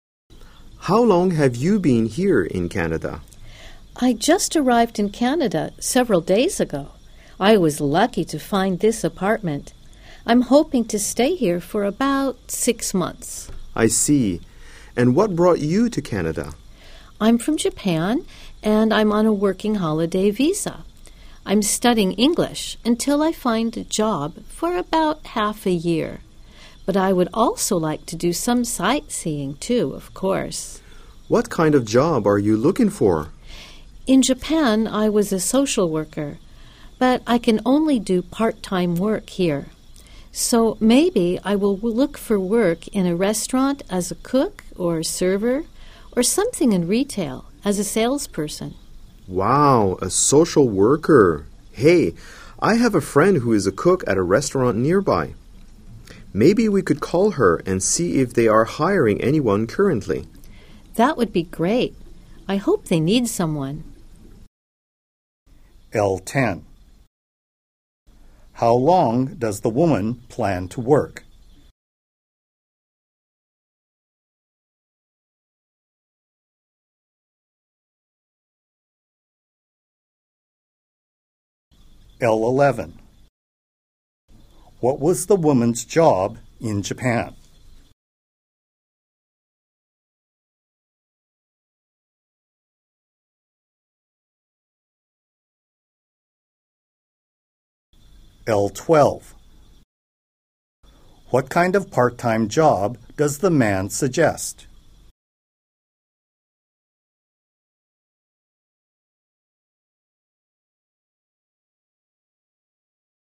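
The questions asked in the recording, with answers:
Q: What was the woman's job in Japan?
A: A social worker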